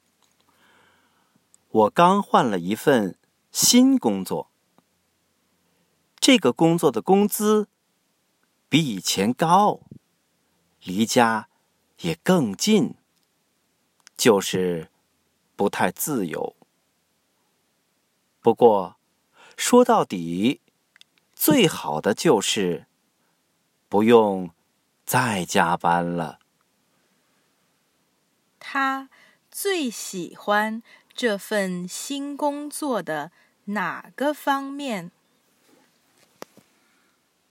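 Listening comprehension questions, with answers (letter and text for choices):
Listen to the audio texts and questions, tick ONE correct answer to each question.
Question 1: What aspect does he like his new job most?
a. Higher salary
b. Closer to home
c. No overtime any more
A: c. No overtime any more

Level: Upper Intermediate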